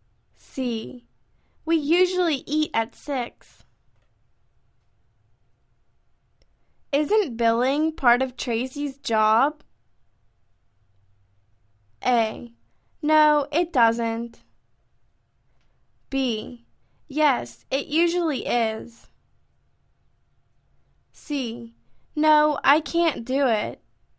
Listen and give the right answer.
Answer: Yes, it usually is.